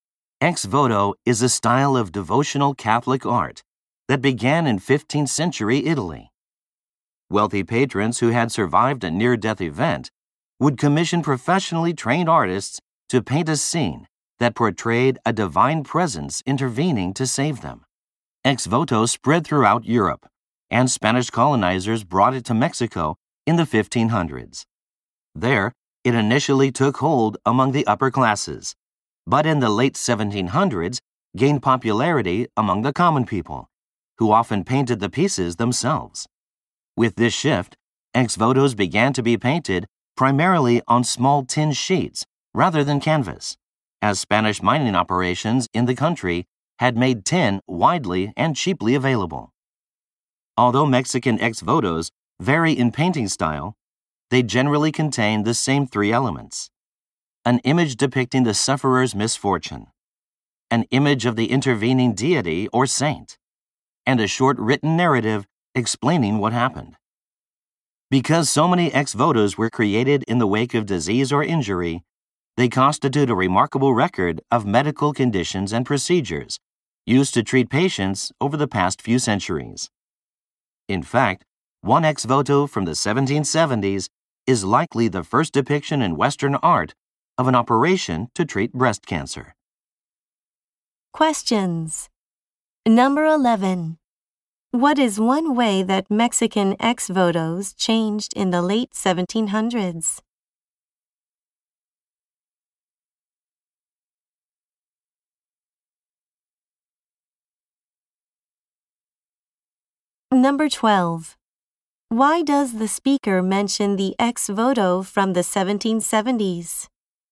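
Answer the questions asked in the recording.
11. They began to be painted mainly on small tin sheets instead of canvas, often by common people.
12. To show that ex votos are a valuable record of medical history; it likely shows the first depiction in Western art of a breast cancer operation.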